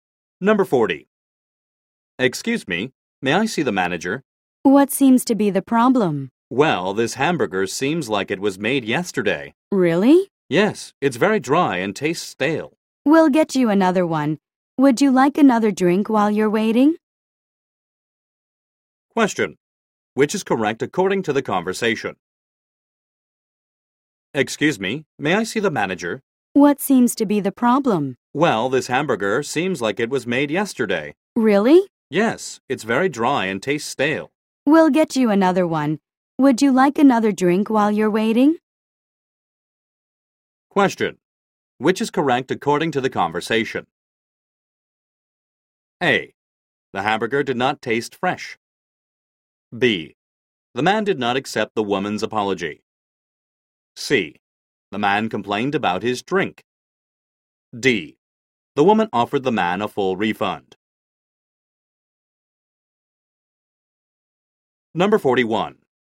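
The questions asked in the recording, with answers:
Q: Which is correct according to the conversation?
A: A: The hamburger did not taste fresh.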